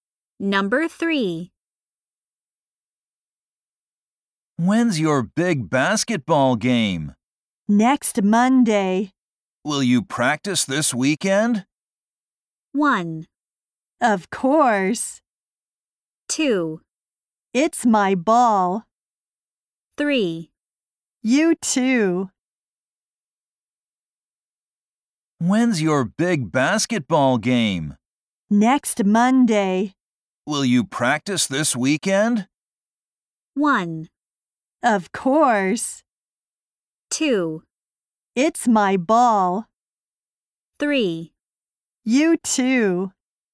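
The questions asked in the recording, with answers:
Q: Will you practice this weekend?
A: 1: Of course.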